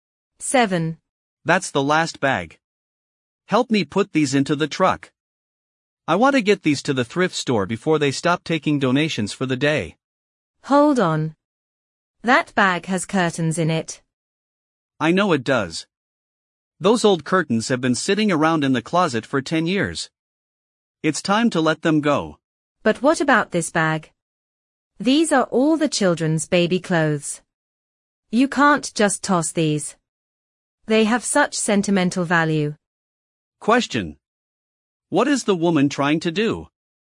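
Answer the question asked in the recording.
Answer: Give old things away to the thrift store.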